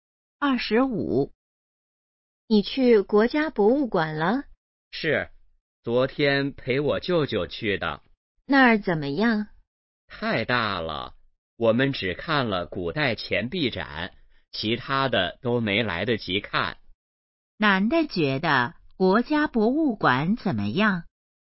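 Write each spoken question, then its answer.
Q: 男的觉得国家博物馆怎么样?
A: 太大了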